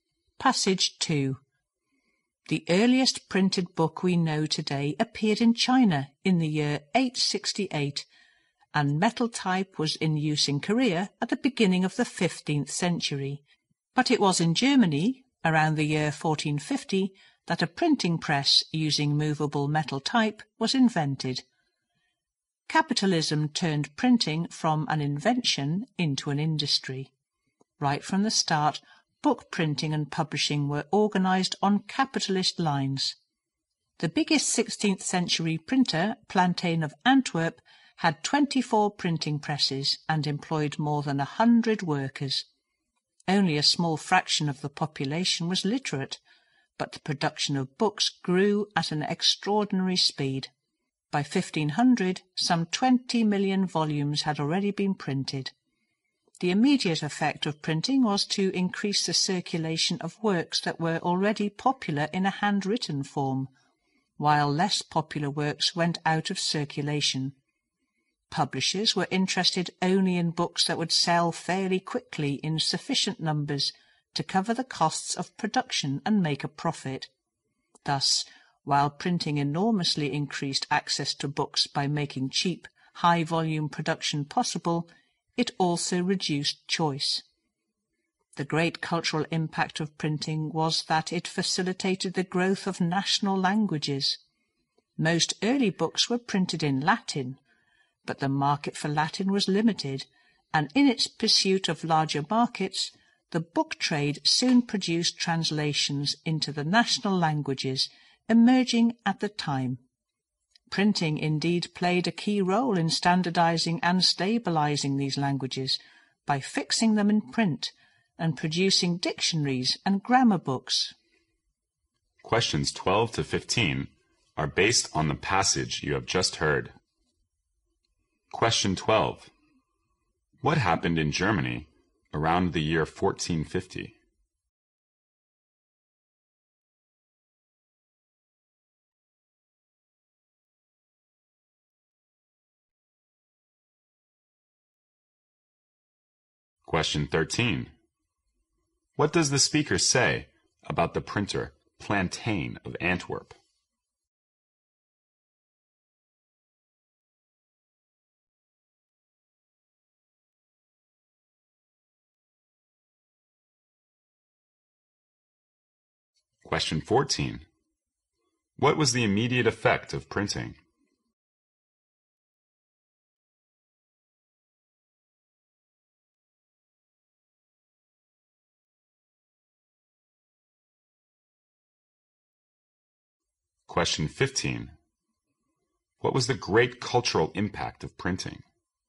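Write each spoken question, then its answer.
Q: What happened in Germany around the year 1450?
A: A printing press using movable metal type was invented

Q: What does the speaker say about the printer Plantain of Antwerp?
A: It was the biggest 16th-century printer, with 24 presses and over 100 workers

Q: What was the immediate effect of printing?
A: Works that were already popular circulated more widely, while less popular ones went out of circulation

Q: What was the great cultural impact of printing?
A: It helped national languages grow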